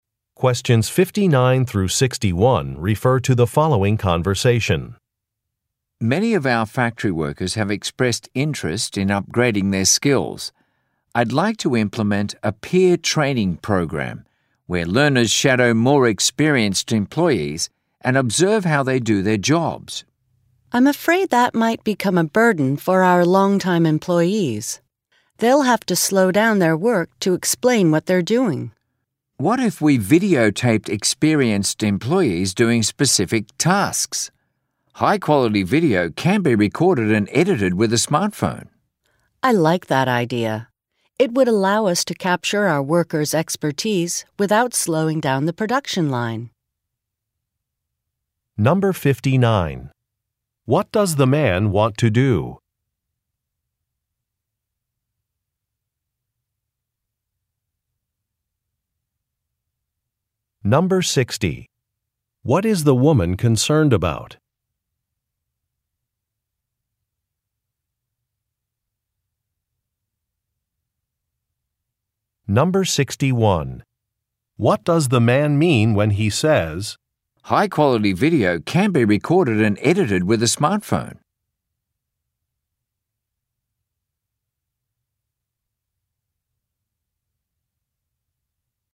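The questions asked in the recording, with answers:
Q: What does the man want to do?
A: Start a peer training program where learners shadow experienced employees

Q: What is the woman concerned about?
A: It might be a burden for longtime employees, slowing down their work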